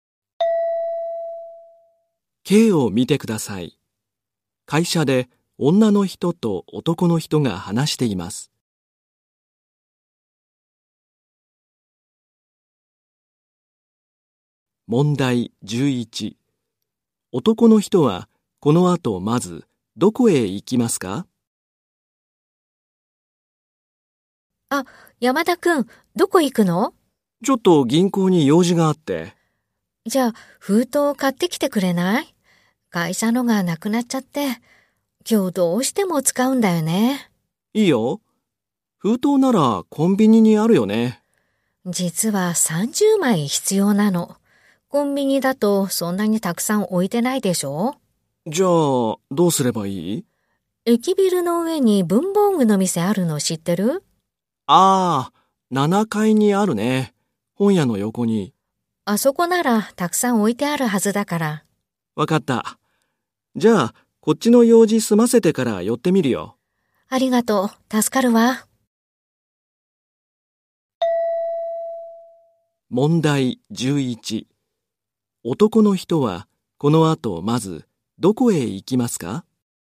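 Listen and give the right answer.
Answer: 銀行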